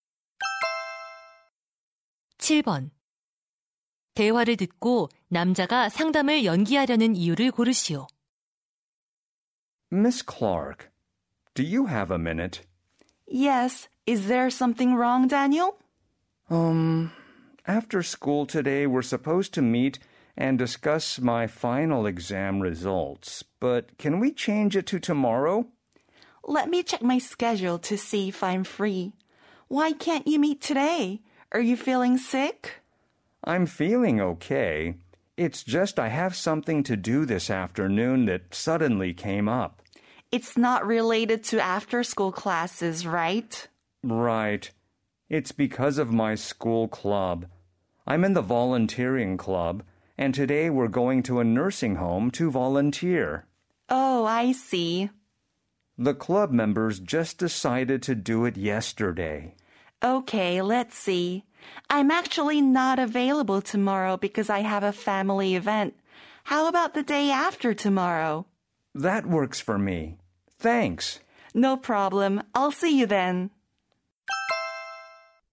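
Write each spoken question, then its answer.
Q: 대화를 듣고 남자가 상담을 연기하려는 이유를 고르시오.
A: 봉사 동아리에서 요양원 봉사를 가야 해서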